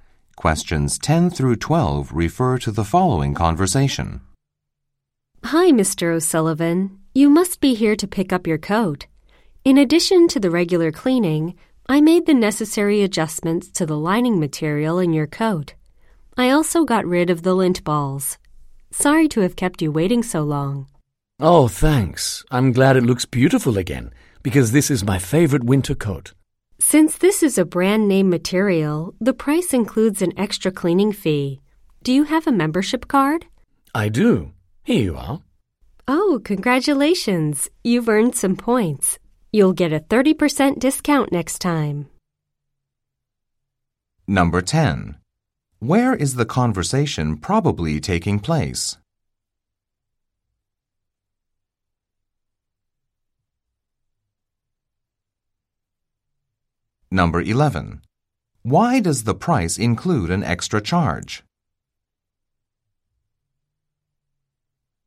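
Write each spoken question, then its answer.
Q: Where is the conversation probably taking place?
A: At a dry cleaner's

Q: Why does the price include an extra charge?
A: Because the coat is a brand-name material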